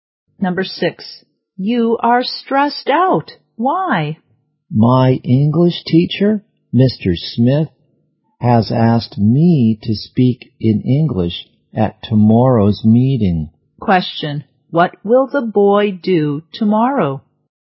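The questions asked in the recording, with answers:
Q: what will the boy do tomorrow?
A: Speak in English at a meeting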